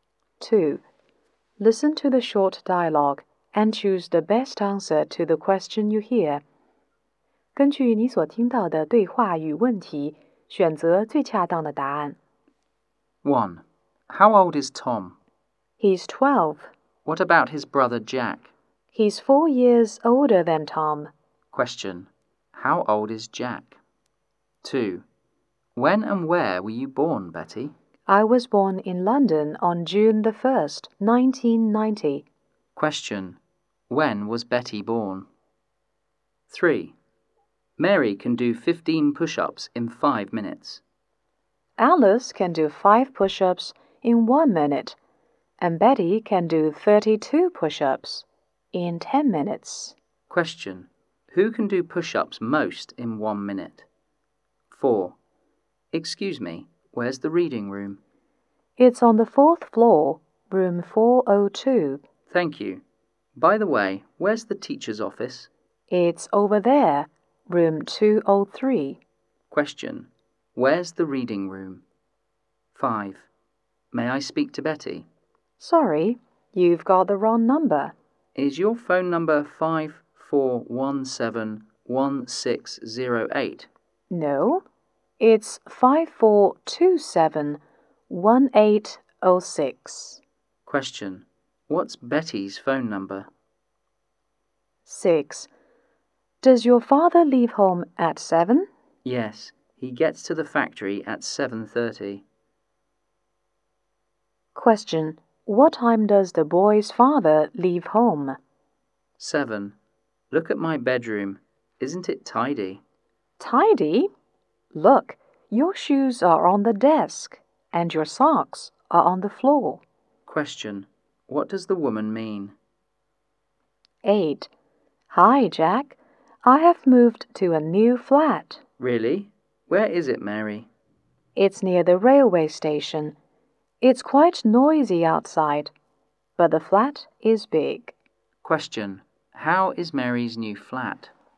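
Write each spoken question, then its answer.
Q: Question. How old is Jack?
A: 16

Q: Question. When was Betty born?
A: On June 1st, 1990

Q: Question. Where's the reading room?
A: On the 4th floor, room 402

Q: Question. What time does the boy's father leave home?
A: At 7

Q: Question. What does the woman mean?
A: The bedroom isn't tidy

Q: Question. How is Mary's new flat?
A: Big but noisy outside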